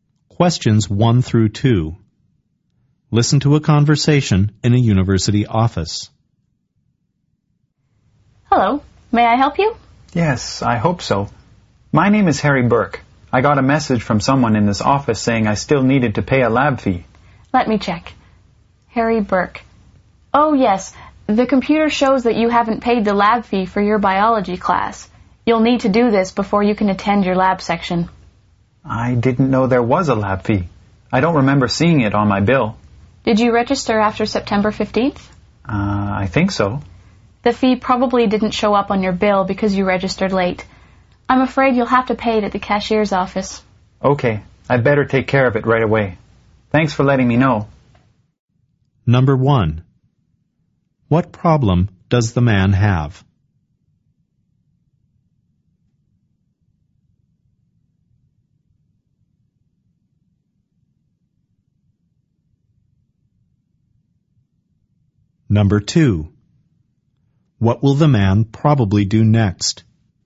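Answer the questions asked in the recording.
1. He hasn't paid the lab fee for his biology class.
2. Go to the cashier's office to pay the lab fee.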